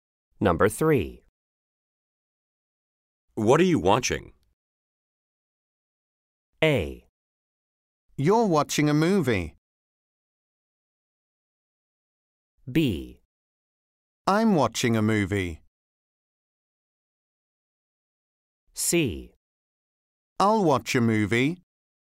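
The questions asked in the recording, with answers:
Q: What are you watching?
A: B: I'm watching a movie.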